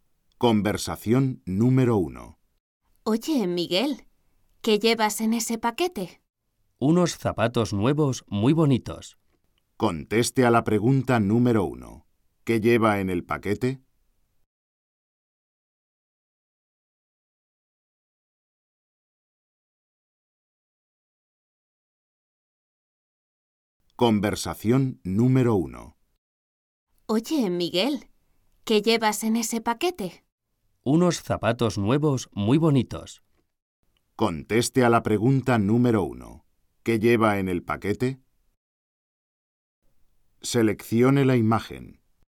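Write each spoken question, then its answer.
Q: ¿Qué lleva en el paquete?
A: Unos zapatos nuevos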